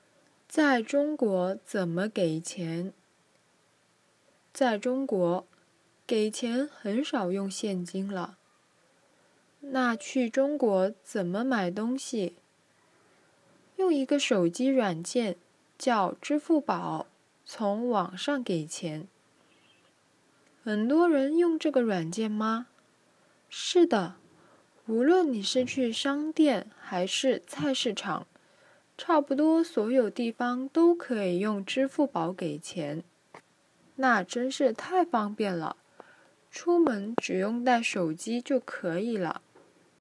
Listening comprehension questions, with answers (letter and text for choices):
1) 在中国,出门只需要带什么就可以了?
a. 手机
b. 电脑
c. 钱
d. 不用带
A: a. 手机

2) 在中国,买东西用什么给钱?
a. 现金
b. 手机软件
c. 电脑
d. 不用给钱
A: b. 手机软件

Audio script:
在中国怎么给钱? 小明:在中国,给钱很少用现金了。 小红:那去中国怎么买东西? 手机软件 c.
小明:用一个手机软件,叫支付宝,从网上给钱。 小红:很多人用这个软件吗? 小明:是的!无论你是去商店还是菜市场,差不多所有地方都可以用支付宝给钱。 小红:那真是太方便了!出门只用带手机就可以了。

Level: intermediate